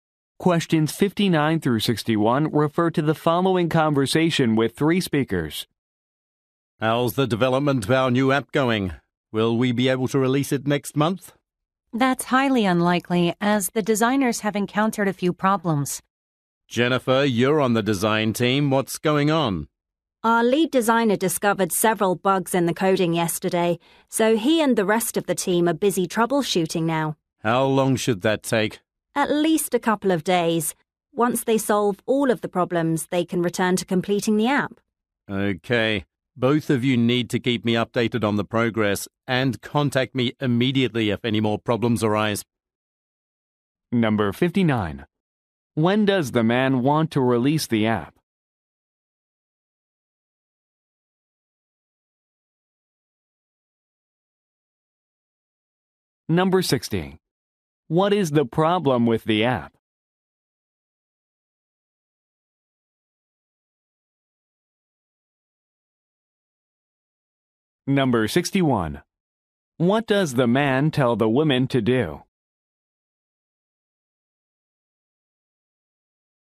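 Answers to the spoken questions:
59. Next month
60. Bugs were found in the coding
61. Keep him updated on the progress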